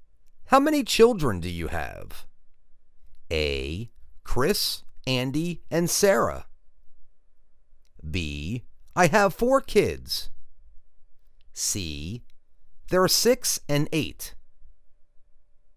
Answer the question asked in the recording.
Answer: I have four kids.